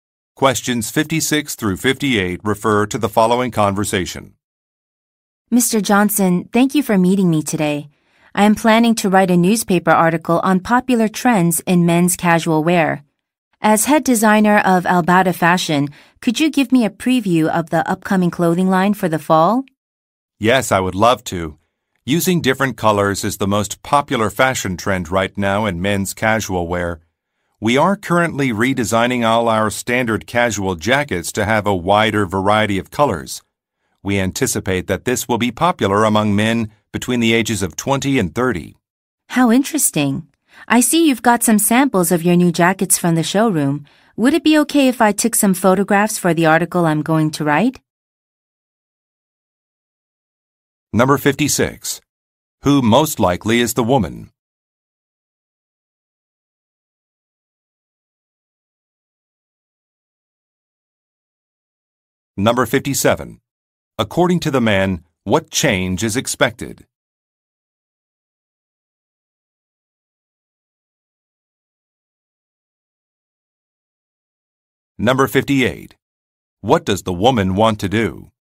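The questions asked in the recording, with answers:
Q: Who most likely is the woman?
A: A journalist (newspaper writer)

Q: According to the man, what change is expected?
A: Casual jackets will come in a wider variety of colors

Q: What does the woman want to do?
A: Take photographs of the sample jackets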